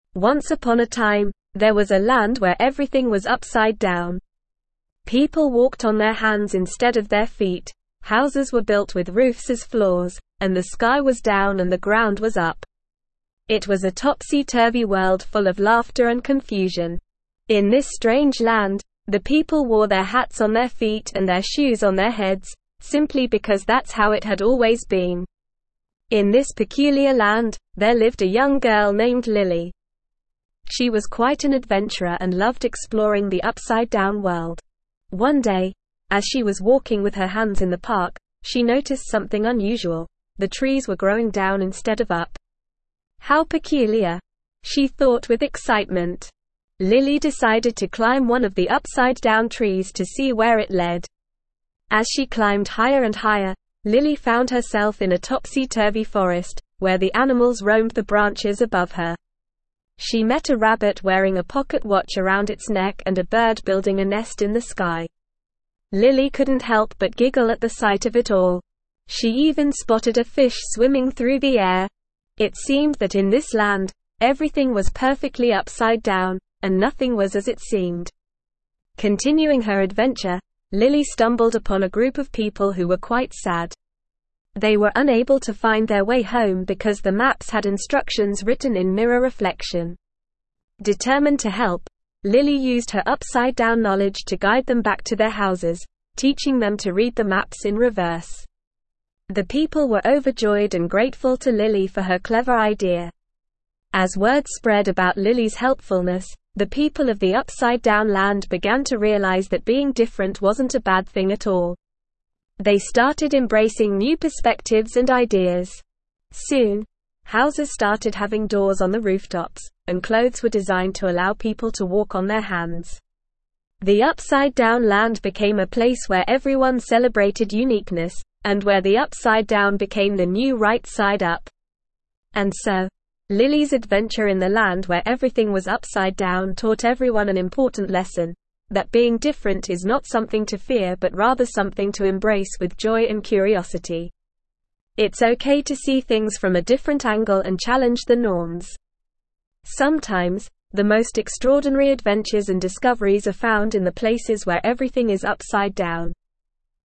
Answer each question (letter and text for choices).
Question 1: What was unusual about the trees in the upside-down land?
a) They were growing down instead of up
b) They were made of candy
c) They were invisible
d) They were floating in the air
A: a) They were growing down instead of up

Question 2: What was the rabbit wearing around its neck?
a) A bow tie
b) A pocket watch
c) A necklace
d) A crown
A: b) A pocket watch

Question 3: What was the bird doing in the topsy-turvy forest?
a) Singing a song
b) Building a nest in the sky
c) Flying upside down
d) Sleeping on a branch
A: b) Building a nest in the sky

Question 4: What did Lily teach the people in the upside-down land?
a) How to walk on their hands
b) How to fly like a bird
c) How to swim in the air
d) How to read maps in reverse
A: d) How to read maps in reverse

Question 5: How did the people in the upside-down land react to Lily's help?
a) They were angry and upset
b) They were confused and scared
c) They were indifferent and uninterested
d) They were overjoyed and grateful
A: d) They were overjoyed and grateful

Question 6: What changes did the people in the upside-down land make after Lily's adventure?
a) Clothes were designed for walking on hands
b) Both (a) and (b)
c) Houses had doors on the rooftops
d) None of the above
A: c) Houses had doors on the rooftops

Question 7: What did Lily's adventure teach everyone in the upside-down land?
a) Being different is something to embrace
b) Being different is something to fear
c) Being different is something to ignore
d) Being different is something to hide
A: a) Being different is something to embrace

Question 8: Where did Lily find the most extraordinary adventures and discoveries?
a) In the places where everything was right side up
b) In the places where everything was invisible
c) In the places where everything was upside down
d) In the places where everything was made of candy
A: c) In the places where everything was upside down

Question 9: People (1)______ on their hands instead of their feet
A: walked

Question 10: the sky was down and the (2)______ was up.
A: ground

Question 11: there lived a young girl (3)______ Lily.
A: named

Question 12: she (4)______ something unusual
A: noticed

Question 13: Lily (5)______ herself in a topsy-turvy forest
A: found

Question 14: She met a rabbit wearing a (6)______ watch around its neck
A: pocket

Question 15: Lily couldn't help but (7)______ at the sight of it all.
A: giggle

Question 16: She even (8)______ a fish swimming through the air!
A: spotted

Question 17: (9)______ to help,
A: Determined

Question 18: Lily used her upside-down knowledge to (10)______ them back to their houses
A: guide

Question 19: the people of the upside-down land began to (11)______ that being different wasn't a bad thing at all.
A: realize

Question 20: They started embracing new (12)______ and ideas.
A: perspectives

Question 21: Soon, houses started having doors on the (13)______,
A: rooftops

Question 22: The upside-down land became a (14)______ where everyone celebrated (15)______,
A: place

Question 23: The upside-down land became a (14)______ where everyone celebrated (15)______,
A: uniqueness

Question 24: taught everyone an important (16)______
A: lesson

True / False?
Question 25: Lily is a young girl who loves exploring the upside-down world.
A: True

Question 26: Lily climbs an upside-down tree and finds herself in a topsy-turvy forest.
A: True

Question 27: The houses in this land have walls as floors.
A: False

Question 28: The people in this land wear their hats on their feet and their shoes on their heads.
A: True

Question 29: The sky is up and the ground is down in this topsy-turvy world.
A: False

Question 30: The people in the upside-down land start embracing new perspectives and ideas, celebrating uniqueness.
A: True

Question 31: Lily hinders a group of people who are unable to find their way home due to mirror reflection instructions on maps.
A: False

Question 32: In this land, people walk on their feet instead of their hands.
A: False

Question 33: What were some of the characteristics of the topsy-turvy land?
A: People walked on their hands instead of their feet.

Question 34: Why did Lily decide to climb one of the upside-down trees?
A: Lily decided to climb one of the upside-down trees because she noticed that the trees were growing down instead of up, and she was curious to see where it led.

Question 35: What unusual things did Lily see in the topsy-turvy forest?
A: Lily saw a rabbit wearing a pocket watch around its neck, a bird building a nest in the sky, and even a fish swimming through the air.

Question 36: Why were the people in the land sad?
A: The people in the land were sad because they were unable to find their way home due to the instructions on the maps being written in mirror reflection.

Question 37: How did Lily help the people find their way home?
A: Lily used her upside-down knowledge to guide the people back to their houses. She taught them to read the maps in reverse, which allowed them to find their way home.

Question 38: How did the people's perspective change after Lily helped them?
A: After Lily helped them, the people began to realize that being different wasn't a bad thing. They started embracing new perspectives and ideas.

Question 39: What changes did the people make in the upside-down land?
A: The people started making changes in the upside-down land, such as having doors on the rooftops of houses and designing clothes that allowed people to walk on their hands. They embraced uniqueness and celebrated being different.

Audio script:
Once upon a time, there was a land where everything was upside down. People walked on their hands instead of their feet, houses were built with roofs as floors, and the sky was down and the ground was up. It was a topsy-turvy world full of laughter and confusion. In this strange land, the people wore their hats on their feet and their shoes on their heads, simply because that's how it had always been.
In this peculiar land, there lived a young girl named Lily. She was quite an adventurer and loved exploring the upside-down world. One day, as she was walking with her hands in the park, she noticed something unusual – the trees were growing down instead of up! "How peculiar!" she thought with excitement. Lily decided to climb one of the upside-down trees to see where it led.
As she climbed higher and higher, Lily found herself in a topsy-turvy forest, where the animals roamed the branches above her. She met a rabbit wearing a pocket watch around its neck and a bird building a nest in the sky. Lily couldn't help but giggle at the sight of it all. She even spotted a fish swimming through the air! It seemed that in this land, everything was perfectly upside down, and nothing was as it seemed.
Continuing her adventure, Lily stumbled upon a group of people who were quite sad. They were unable to find their way home because the maps had instructions written in mirror reflection. Determined to help, Lily used her upside-down knowledge to guide them back to their houses, teaching them to read the maps in reverse. The people were overjoyed and grateful to Lily for her clever idea.
As word spread about Lily's helpfulness, the people of the upside-down land began to realize that being different wasn't a bad thing at all. They started embracing new perspectives and ideas. Soon, houses started having doors on the rooftops, and clothes were designed to allow people to walk on their hands. The upside-down land became a place where everyone celebrated uniqueness, and where the upside-down became the new right side up.
And so, Lily's adventure in the land where everything was upside down taught everyone an important lesson – that being different is not something to fear but rather something to embrace with joy and curiosity. It's okay to see things from a different angle and challenge the norms. Sometimes, the most extraordinary adventures and discoveries are found in the places where everything is upside down.

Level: Level 4